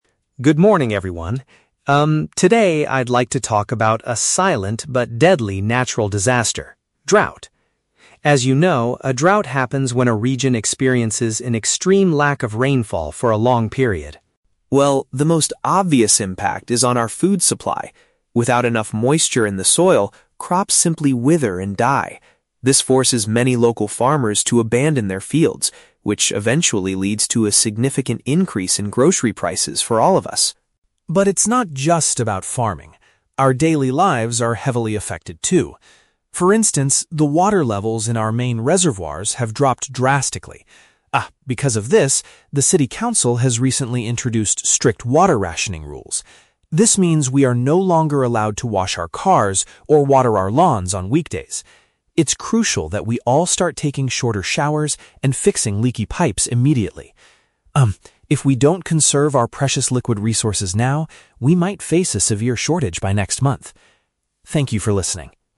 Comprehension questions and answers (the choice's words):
Listen to a student giving a short presentation and choose the correct answer (A, B, or C) for each question.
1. According to the speaker, what is a direct result of the dry soil?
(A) Food at the supermarket becomes much more expensive.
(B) Local farmers have to move to different cities to work.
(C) People start planting new types of vegetables.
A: Food at the supermarket becomes much more expensive.

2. Why did the local government establish new water regulations?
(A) Because citizens were wasting too much water on the weekends.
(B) Because the public water storage has gone down significantly.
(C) Because they want to repair all the broken pipes in the city.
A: Because the public water storage has gone down significantly.

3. What are residents currently prohibited from doing during the week?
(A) Taking long baths in the morning.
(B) Buying large amounts of bottled water.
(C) Cleaning their personal vehicles.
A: Cleaning their personal vehicles.

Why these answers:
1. The speaker says that crops dying leads to "a significant increase in grocery prices". "Food at the supermarket" is a paraphrase of groceries, and "more expensive" means an increase in prices. Why traps are wrong: Option (B) is a trap. The audio mentions that farmers "abandon their fields", but it doesn't say they move to different cities. Option (C) is plausible in a drought context but is never mentioned in the speech.
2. Alex explains that "the water levels in our main reservoirs have dropped drastically". "Public water storage" is a synonym for main reservoirs, and "gone down significantly" means dropped drastically. Why traps are wrong: Option (A) is a trap. The audio mentions "weekdays" regarding the new rules, but it doesn't say the rules were made because people wasted water on weekends. Option (C) is a trap using words from the audio; Alex advises people to fix "leaky pipes", but this is a personal advice, not the government's reason for the rules.
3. The speaker states that people are "no longer allowed to wash our cars... on weekdays". "Cleaning their personal vehicles" is a direct paraphrase of washing cars. Why traps are wrong: Option (A) is a trap. Alex suggests "taking shorter showers" as a good idea to save water, but it is not a strict rule or prohibition by the city council. Option (B) is not mentioned in the audio at all.

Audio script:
Alex: Good morning, everyone. Um, today I'd like to talk about a silent but deadly natural disaster... drought. As you know, a drought happens when a region experiences an extreme lack of rainfall for a long period.
Well, the most obvious impact is on our food supply. Without enough moisture in the soil, crops simply wither and die. This forces many local farmers to abandon their fields, which eventually leads to a significant increase in grocery prices for all of us.
But it's not just about farming. Our daily lives are heavily affected too. For instance, the water levels in our main reservoirs have dropped drastically. Ah, because of this, the city council has recently introduced strict water rationing rules. This means we are no longer allowed to wash our cars or water our lawns on weekdays. It's crucial that we all start taking shorter showers and fixing leaky pipes immediately. Um, if we don't conserve our precious liquid resources now, we might face a severe shortage by next month. Thank you for listening.